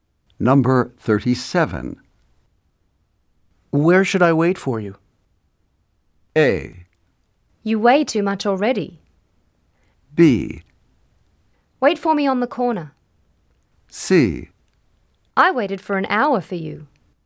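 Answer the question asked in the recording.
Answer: B: Wait for me on the corner.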